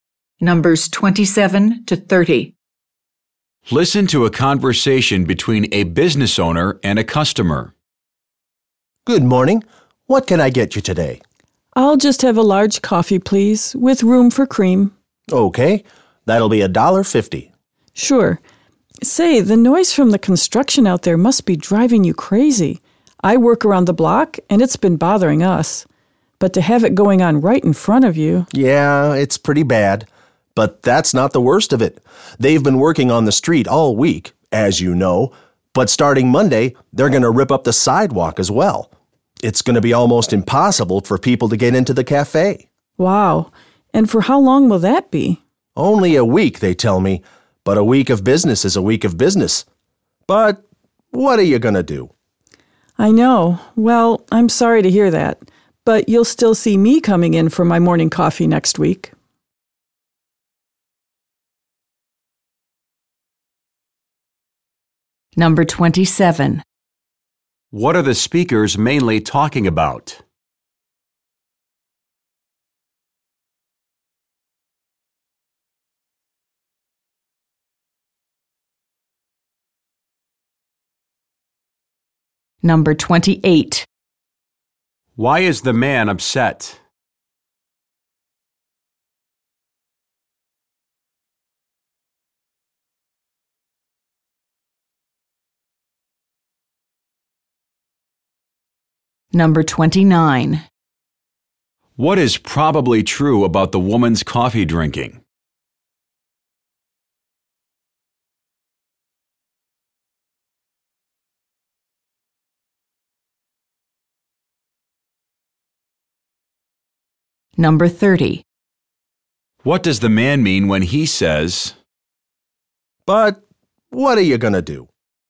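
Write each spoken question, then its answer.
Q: What are the speakers mainly talking about?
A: The street construction outside the cafe.

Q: Why is the man upset?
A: The sidewalk will be torn up for a week, so customers can hardly get into the cafe and he will lose business.

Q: What is probably true about the woman's coffee drinking?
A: She regularly buys her morning coffee at this cafe.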